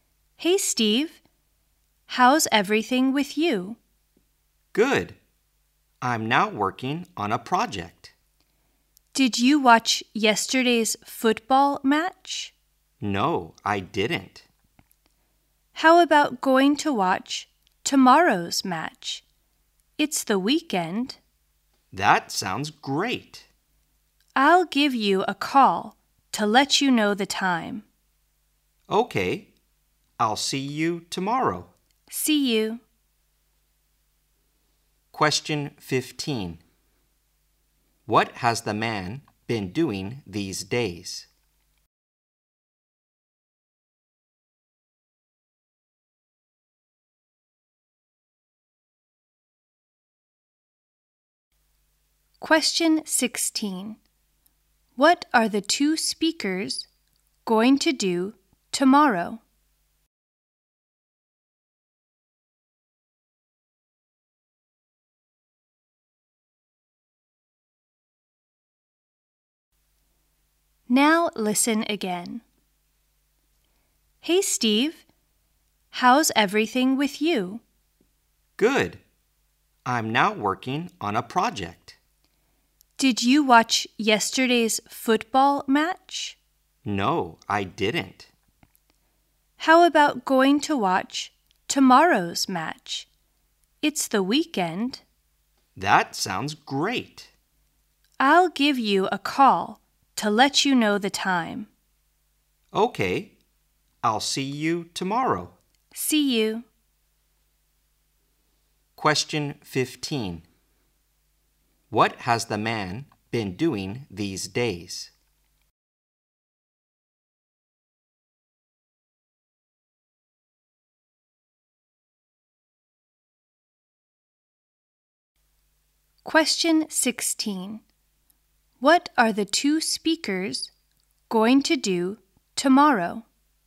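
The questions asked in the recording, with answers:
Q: What has the man been doing these days?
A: Working on a project

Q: What are the two speakers going to do tomorrow?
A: Watch a football match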